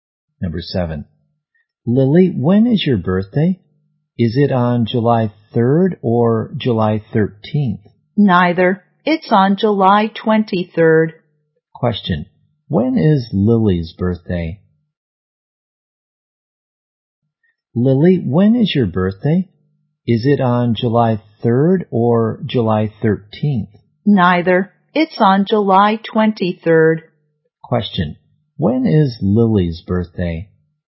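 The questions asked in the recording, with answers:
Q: When is Lily's birthday?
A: July 23rd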